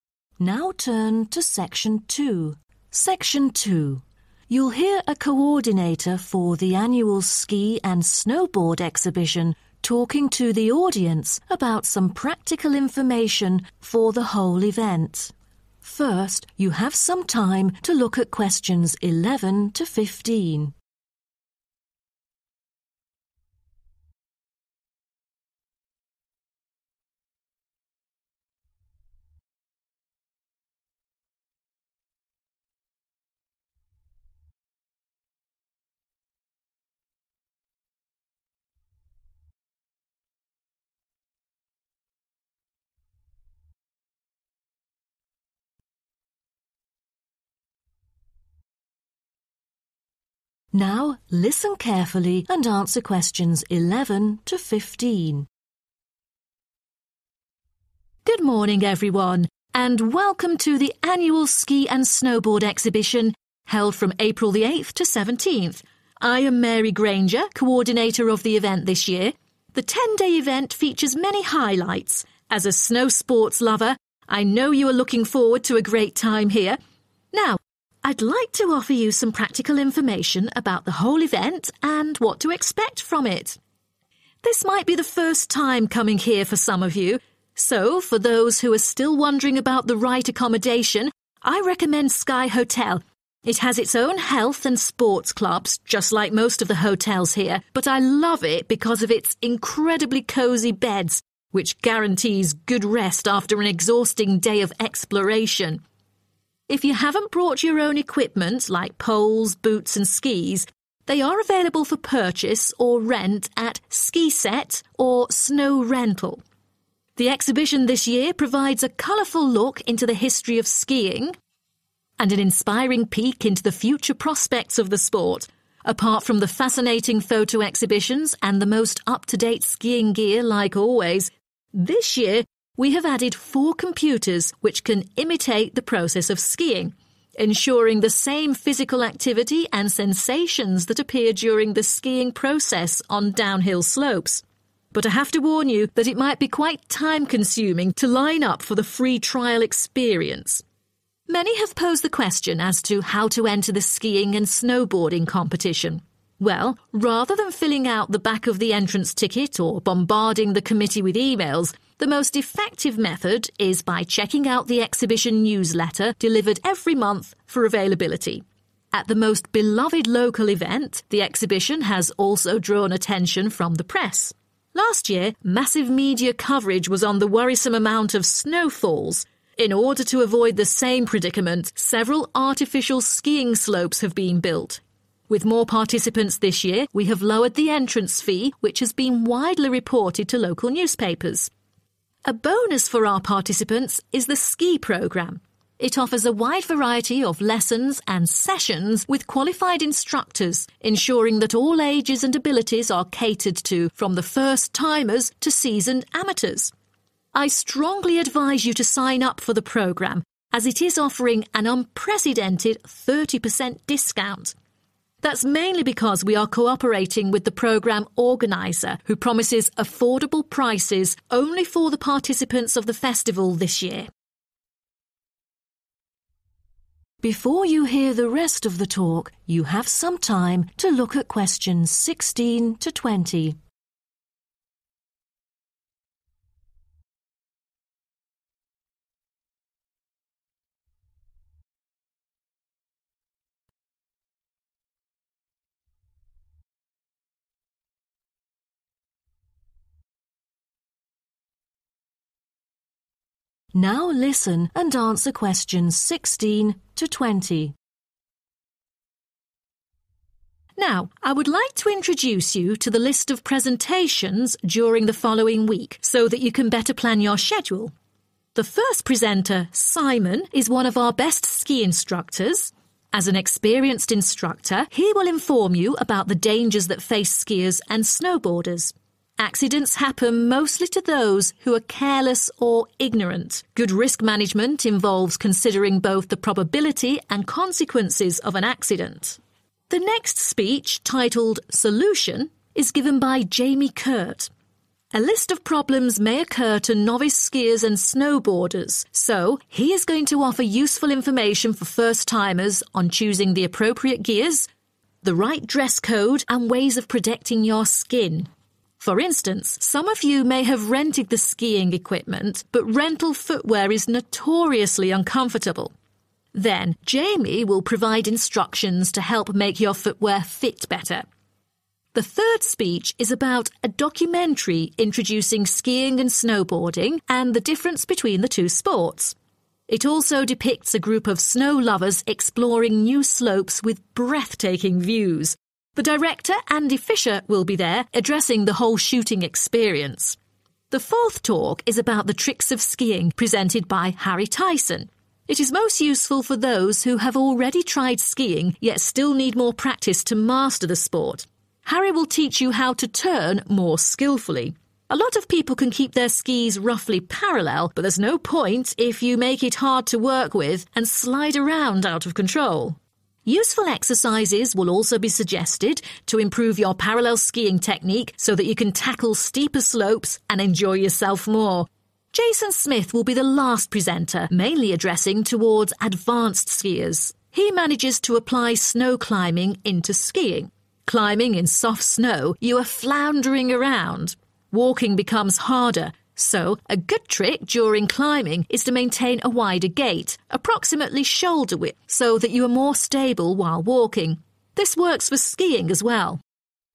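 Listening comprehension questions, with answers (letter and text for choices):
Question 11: Why does the speaker recommend the Sky Hotel?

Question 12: What is new in this year's exhibition?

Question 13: How do people enter the skiing and snowboarding competition?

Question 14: What did the media focus on this year?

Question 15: Why does the speaker recommend the ski program?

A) exploring new destinations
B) how to make the skiing boots comfortable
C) how to become a ski instructor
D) how to combine other activities with skiing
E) how to improve the skills of skiing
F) information about skiing safety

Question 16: Simon's talk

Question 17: Solution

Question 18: Film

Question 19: Tricks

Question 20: Johnson's talk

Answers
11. its incredibly cozy beds
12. computers that simulate skiing
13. by checking the monthly exhibition newsletter
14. the lowered entrance fee
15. it offers a 30% discount
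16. F) information about skiing safety
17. B) how to make the skiing boots comfortable
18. A) exploring new destinations
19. E) how to improve the skills of skiing
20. D) how to combine other activities with skiing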